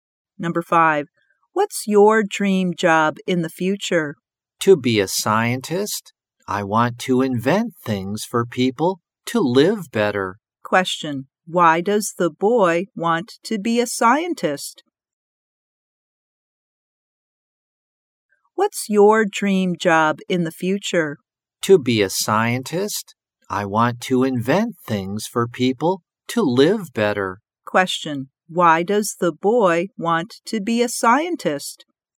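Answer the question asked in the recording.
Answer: He wants to invent things to help people live better.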